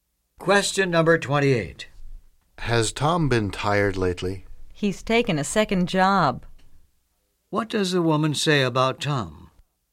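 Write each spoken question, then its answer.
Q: What does the woman say about Tom?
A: He has taken a second job, so he is tired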